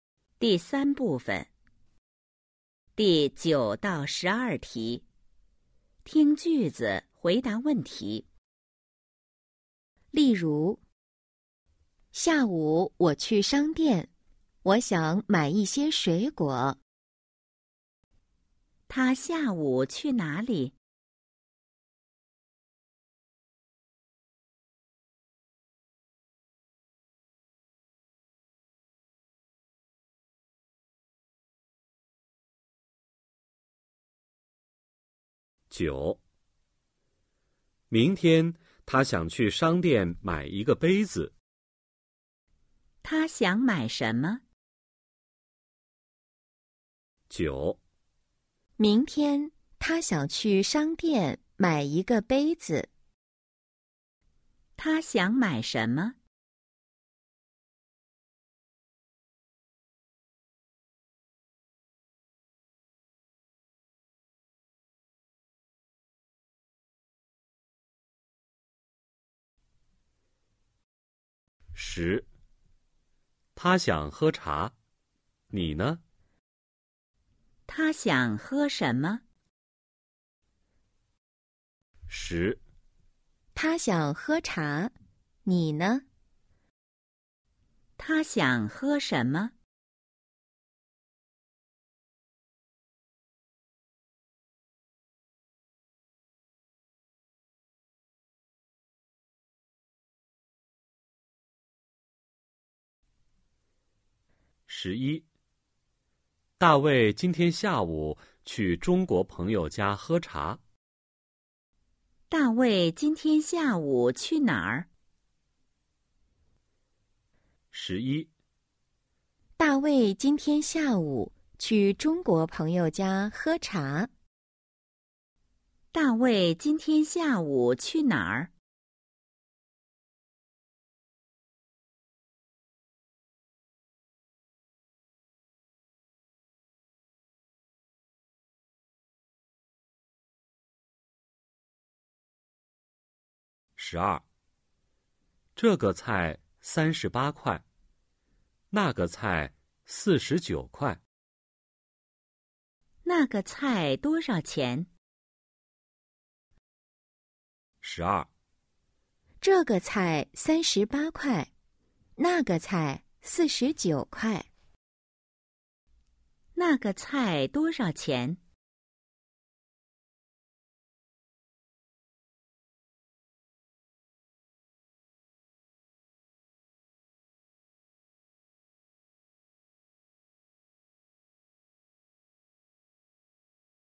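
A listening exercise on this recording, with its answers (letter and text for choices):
第 9–12 题:听句子,回答问题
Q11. 大卫今天下午去哪儿?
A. 商店 shāngdiàn – cửa hàng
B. 学校 xuéxiào – trường học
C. 朋友家 péngyou jiā – nhà bạn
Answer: C. 朋友家 péngyou jiā – nhà bạn

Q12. 那个菜多少钱?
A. 38块 sānshíbā kuài – 38 tệ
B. 79块 qīshíjiǔ kuài – 79 tệ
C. 49块 sìshíjiǔ kuài – 49 tệ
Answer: C. 49块 sìshíjiǔ kuài – 49 tệ

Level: HSK 1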